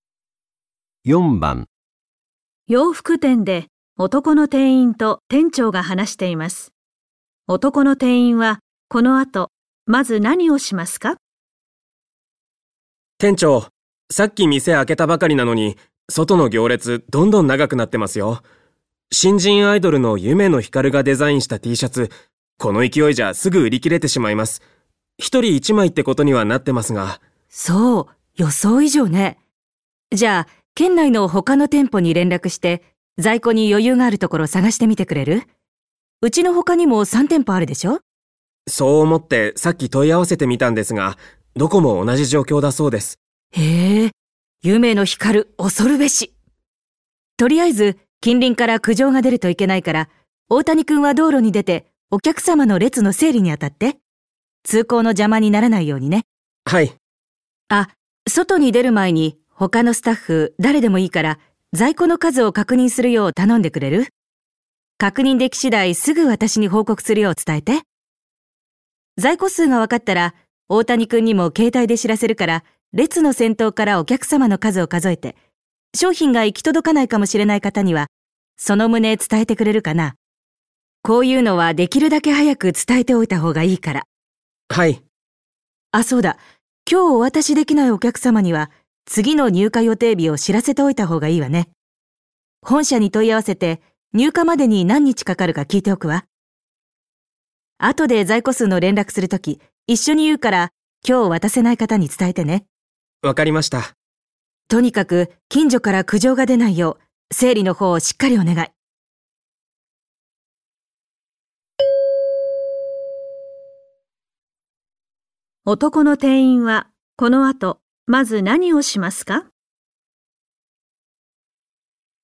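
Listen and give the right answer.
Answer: 他のスタッフに在庫の数を確認するよう頼む

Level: N1级别听力题库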